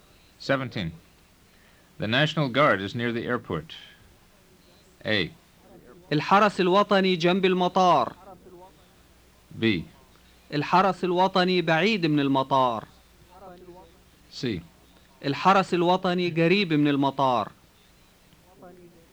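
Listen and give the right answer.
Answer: C: الحرس الوطني قريب من المطار.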